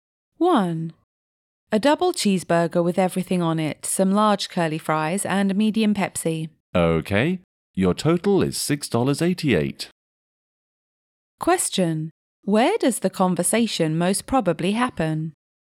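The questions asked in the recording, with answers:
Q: Where does the conversation most probably happen?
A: At a fast-food restaurant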